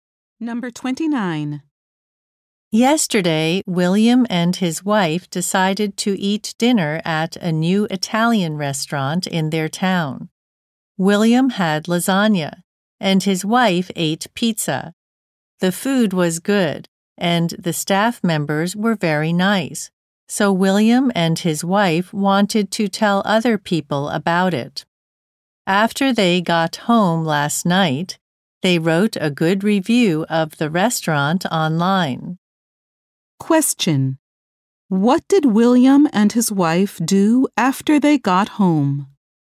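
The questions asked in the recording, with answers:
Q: What did William and his wife do after they got home?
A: They wrote a good online review of the restaurant.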